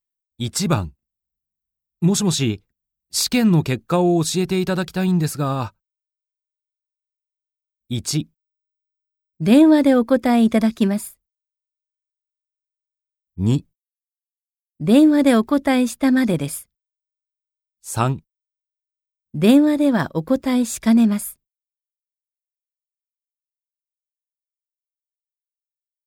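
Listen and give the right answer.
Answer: 3: 電話ではお答えしかねます。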